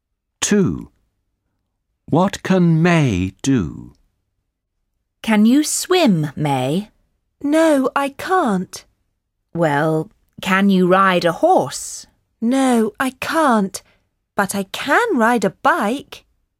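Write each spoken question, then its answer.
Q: What can May do?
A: She can ride a bike.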